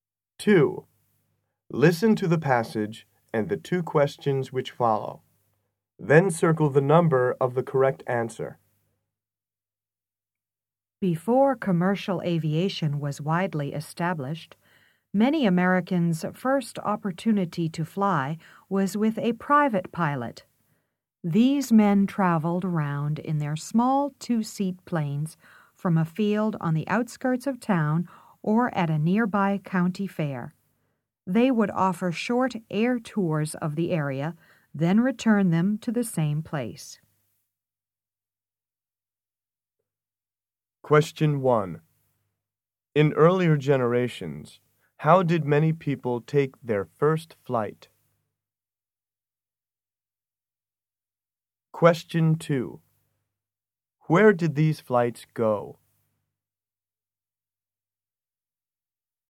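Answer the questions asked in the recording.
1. With a private pilot
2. Short air tours of the area, returning to the same place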